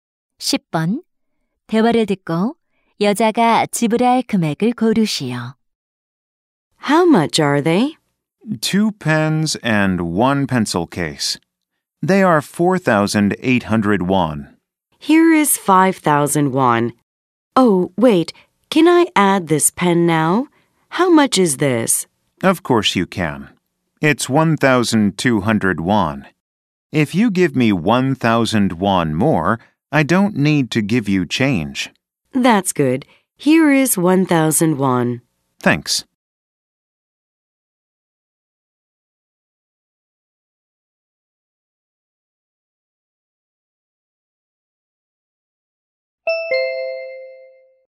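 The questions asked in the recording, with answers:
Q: 대화를 듣고 여자가 지불할 금액을 고르시오.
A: 6,000원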